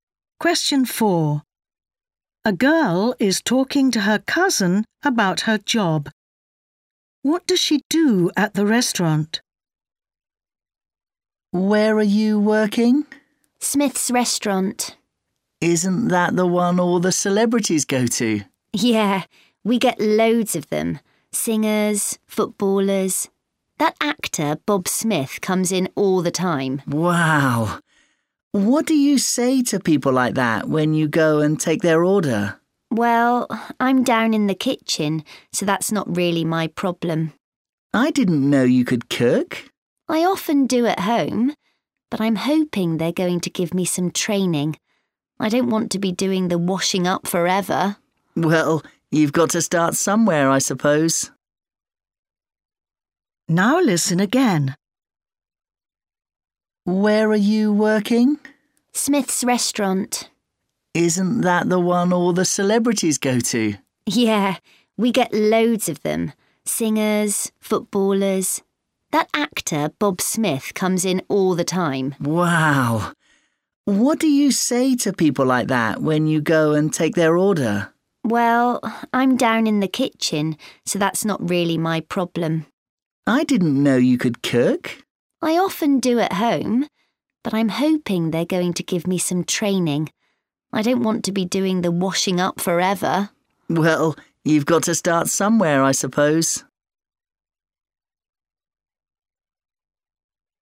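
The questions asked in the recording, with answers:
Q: What does she do at the restaurant?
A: the washing up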